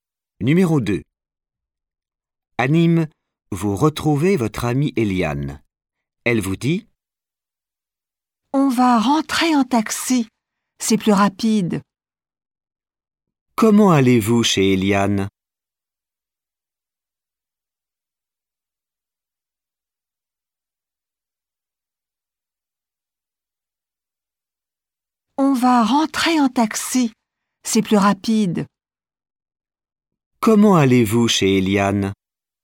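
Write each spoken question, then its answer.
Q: Comment allez-vous chez Eliane ?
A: En taxi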